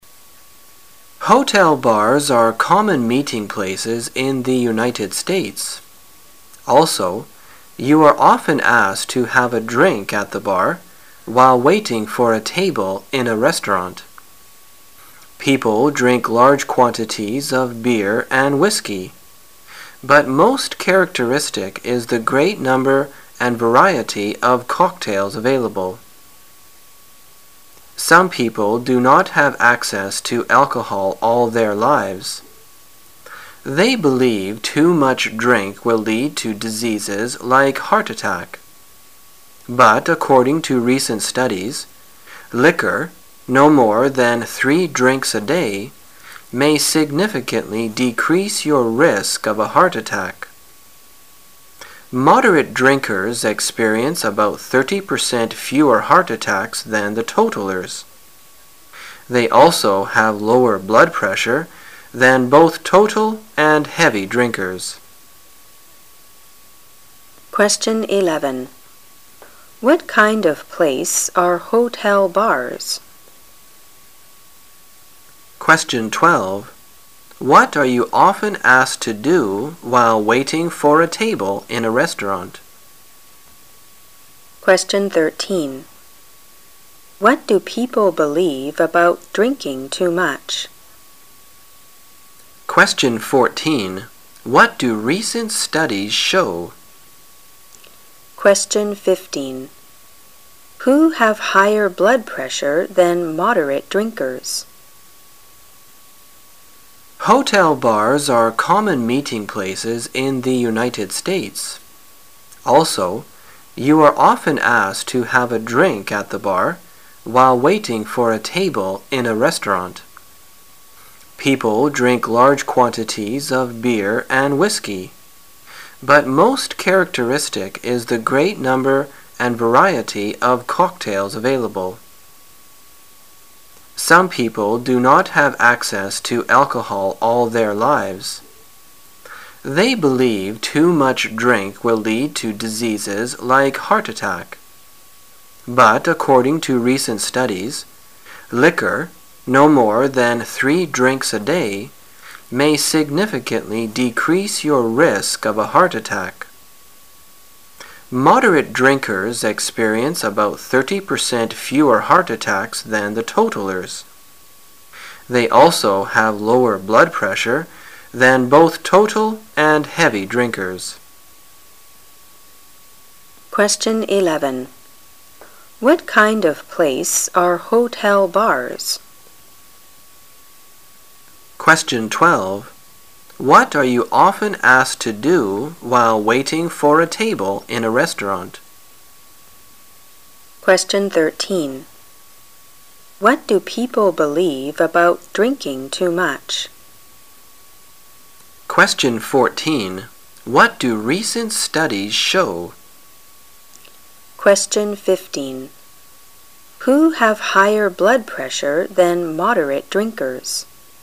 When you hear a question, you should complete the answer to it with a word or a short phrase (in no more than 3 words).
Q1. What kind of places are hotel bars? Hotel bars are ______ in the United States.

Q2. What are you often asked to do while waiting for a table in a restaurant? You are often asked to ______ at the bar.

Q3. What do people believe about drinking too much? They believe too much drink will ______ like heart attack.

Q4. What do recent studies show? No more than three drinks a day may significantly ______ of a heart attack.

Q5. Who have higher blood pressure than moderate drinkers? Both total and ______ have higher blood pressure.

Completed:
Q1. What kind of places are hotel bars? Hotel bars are common meeting places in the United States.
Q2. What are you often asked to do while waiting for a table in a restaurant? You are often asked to have a drink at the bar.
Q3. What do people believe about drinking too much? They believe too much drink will lead to disease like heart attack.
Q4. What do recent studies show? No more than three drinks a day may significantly decrease your risk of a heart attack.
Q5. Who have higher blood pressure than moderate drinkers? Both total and heavy drinkers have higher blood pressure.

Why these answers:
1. 事实细节题。见短文第一句Hotel bars are common meeting places in the United States。
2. 事实细节题。见短文第二句You are often asked to have a drink at the bar。
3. 事实细节题。见短文第二段第二句They behave too much drink will lead to disease like heart attack。
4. 事实细节题。见短文第二段第三句No more than three drinks a day may significantly decrease your risk of a heart attack。
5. 事实细节题。见短文最后一句Total and heavy drinkers have higher blood pressure。

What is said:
common meeting places
[解析] 11-15 Hotel bars are common meeting places in the United States. Also, you are often asked to have a drink at the bar, while waiting for a table in a restaurant. People drink large quantities of beer and whiskey, but most characteristic is the great number and variety of cocktails available. Some people do not have access to alcohol all their lives. They believe too much drink will lead to diseases like heart attack. But according to recent studies, liquor-no more than three drinks a day-- may significantly decrease your risk of a heart attack. Moderate drinkers experience about 30 percent fewer heart attacks than the totallers. They also have lower blood pressure than both total and heavy drinkers. 11.Q: What kind of place are hotel bars?